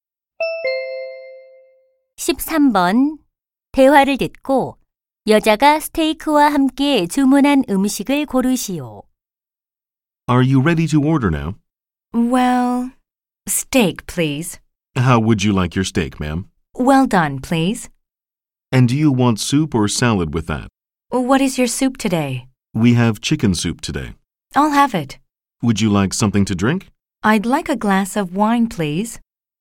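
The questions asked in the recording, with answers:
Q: 대화를 듣고 여자가 스테이크와 함께 주문한 음식을 고르시오.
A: 치킨 수프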